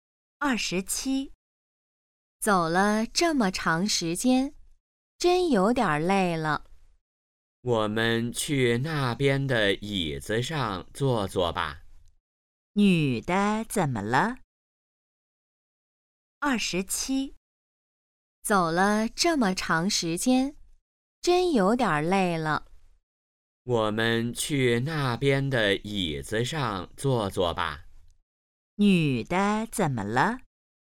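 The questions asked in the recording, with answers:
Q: 女的怎么了?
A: 有点累了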